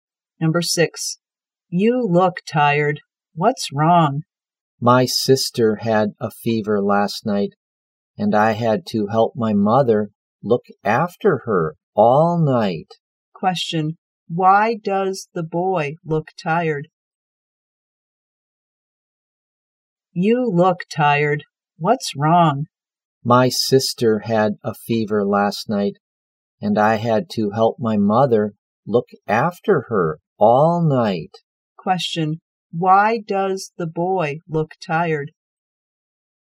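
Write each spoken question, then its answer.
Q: Why does the boy look tired?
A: He helped look after his sick sister all night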